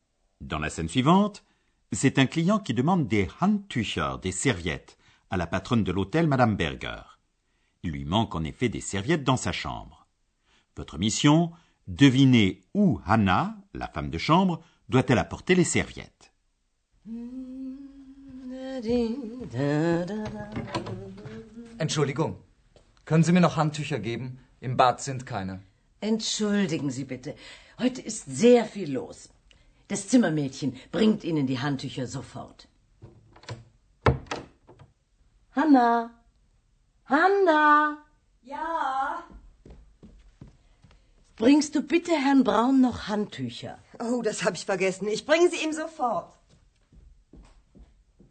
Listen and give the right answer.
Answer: Hanna doit apporter les serviettes manquantes à Monsieur Braun.